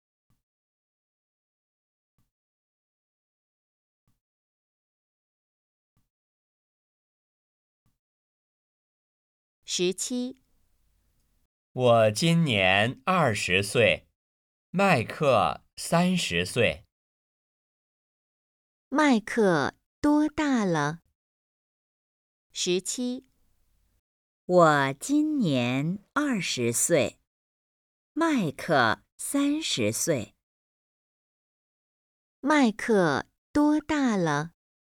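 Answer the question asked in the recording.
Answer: 三十岁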